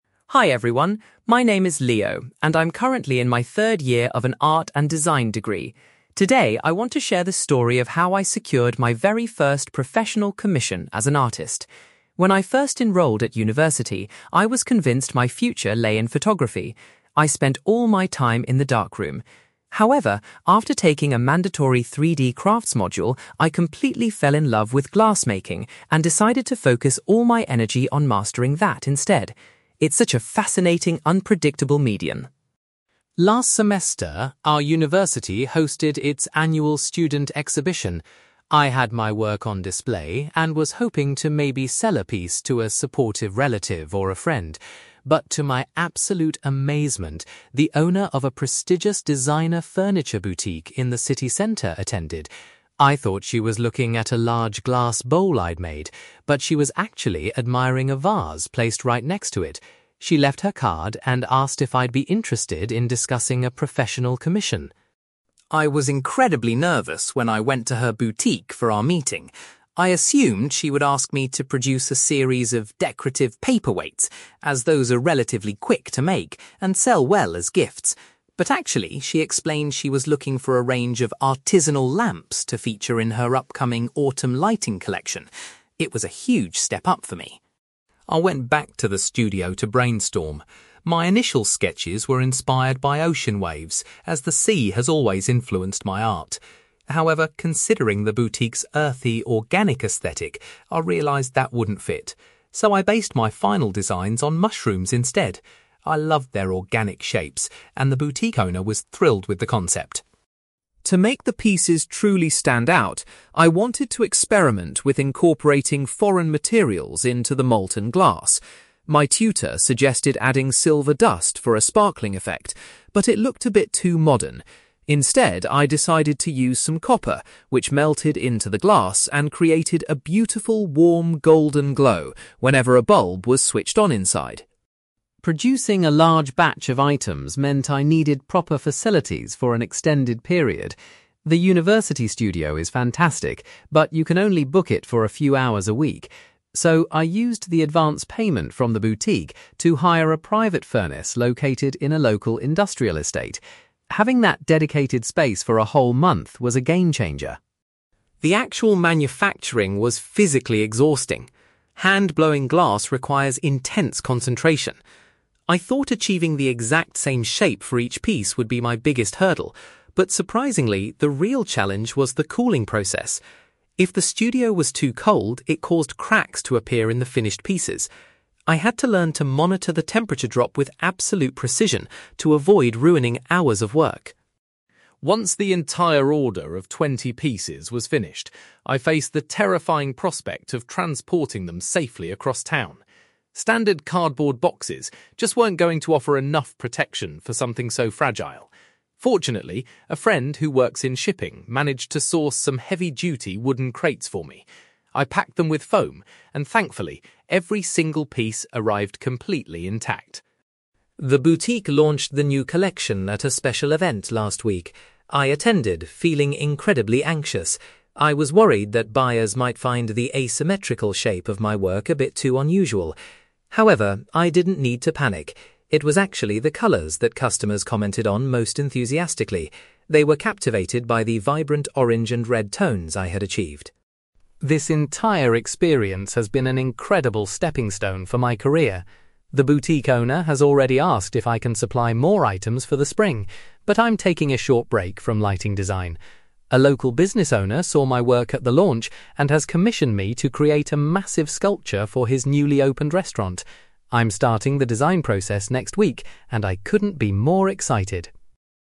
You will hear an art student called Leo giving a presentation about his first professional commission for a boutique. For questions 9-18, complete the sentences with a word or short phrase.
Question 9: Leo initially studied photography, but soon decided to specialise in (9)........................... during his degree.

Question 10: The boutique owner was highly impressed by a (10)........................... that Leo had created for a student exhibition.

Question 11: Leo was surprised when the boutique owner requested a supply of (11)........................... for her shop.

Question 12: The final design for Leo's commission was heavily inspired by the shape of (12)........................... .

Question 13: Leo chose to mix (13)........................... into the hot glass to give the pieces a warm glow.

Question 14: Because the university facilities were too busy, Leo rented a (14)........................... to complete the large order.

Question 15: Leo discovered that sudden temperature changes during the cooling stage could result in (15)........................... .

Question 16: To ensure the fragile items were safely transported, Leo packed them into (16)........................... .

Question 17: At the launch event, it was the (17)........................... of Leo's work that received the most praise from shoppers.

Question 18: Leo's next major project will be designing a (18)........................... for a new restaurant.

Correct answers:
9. glassmaking
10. vase
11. lamps
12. mushrooms
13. copper
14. furnace
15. cracks
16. wooden crates
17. colours
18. sculpture

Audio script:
Leo: Hi everyone, my name is Leo, and I'm currently in my third year of an art and design degree. Today I want to share the story of how I secured my very first professional commission as an artist. When I first enrolled at university, I was convinced my future lay in photography. I spent all my time in the darkroom. However, after taking a mandatory 3D crafts module, I completely fell in love with glassmaking and decided to focus all my energy on mastering that instead. It's such a fascinating, unpredictable medium.
Last semester, our university hosted its annual student exhibition. I had my work on display and was hoping to maybe sell a piece to a supportive relative or a friend. But to my absolute amazement, the owner of a prestigious designer furniture boutique in the city centre attended. I thought she was looking at a large glass bowl I'd made, but she was actually admiring a vase placed right next to it. She left her card and asked if I'd be interested in discussing a professional commission.
I was incredibly nervous when I went to her boutique for our meeting. I assumed she would ask me to produce a series of decorative paperweights, as those are relatively quick to make and sell well as gifts. But actually, she explained she was looking for a range of artisanal lamps to feature in her upcoming autumn lighting collection. It was a huge step up for me.
I went back to the studio to brainstorm. My initial sketches were inspired by ocean waves, as the sea has always influenced my art. However, considering the boutique's earthy, organic aesthetic, I realised that wouldn't fit. So, I based my final designs on mushrooms instead. I loved their organic shapes, and the boutique owner was thrilled with the concept.
To make the pieces truly stand out, I wanted to experiment with incorporating foreign materials into the molten glass. My tutor suggested adding silver dust for a sparkling effect, but it looked a bit too modern. Instead, I decided to use some copper, which melted into the glass and created a beautiful, warm, golden glow whenever a bulb was switched on inside.
Producing a large batch of items meant I needed proper facilities for an extended period. The university studio is fantastic, but you can only book it for a few hours a week. So, I used the advance payment from the boutique to hire a private furnace located in a local industrial estate. Having that dedicated space for a whole month was a game-changer.
The actual manufacturing was physically exhausting. Hand-blowing glass requires intense concentration. I thought achieving the exact same shape for each piece would be my biggest hurdle. But surprisingly, the real challenge was the cooling process. If the studio was too cold, it caused cracks to appear in the finished pieces. I had to learn to monitor the temperature drop with absolute precision to avoid ruining hours of work.
Once the entire order of twenty pieces was finished, I faced the terrifying prospect of transporting them safely across town. Standard cardboard boxes just weren't going to offer enough protection for something so fragile. Fortunately, a friend who works in shipping managed to source some heavy-duty wooden crates for me. I packed them with foam, and thankfully, every single piece arrived completely intact.
The boutique launched the new collection at a special event last week. I attended, feeling incredibly anxious. I was worried that buyers might find the asymmetrical shape of my work a bit too unusual. However, I didn't need to panic. It was actually the colours that customers commented on most enthusiastically. They were captivated by the vibrant orange and red tones I had achieved.
This entire experience has been an incredible stepping stone for my career. The boutique owner has already asked if I can supply more items for the spring, but I'm taking a short break from lighting design. A local business owner saw my work at the launch and has commissioned me to create a massive sculpture for his newly opened restaurant. I'm starting the design process next week, and I couldn't be more excited!

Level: B2